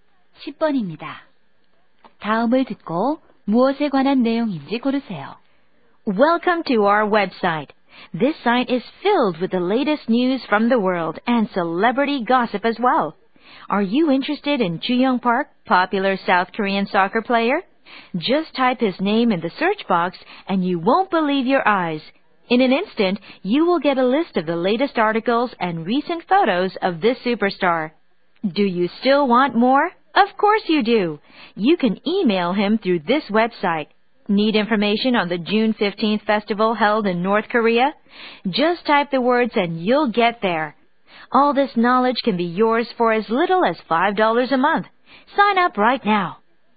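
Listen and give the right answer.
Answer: 유료 뉴스·정보 웹사이트 광고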